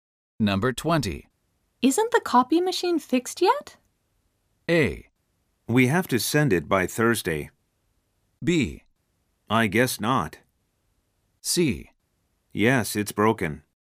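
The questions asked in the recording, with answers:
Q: Isn't the copy machine fixed yet?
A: B: I guess not.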